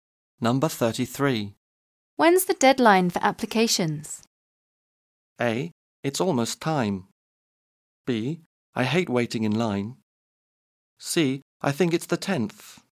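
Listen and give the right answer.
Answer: C: I think it's the 10th.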